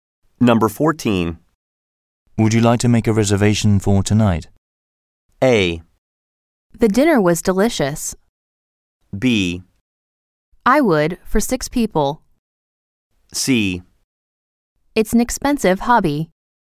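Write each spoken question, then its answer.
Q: Would you like to make a reservation for tonight?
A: B: I would, for 6 people.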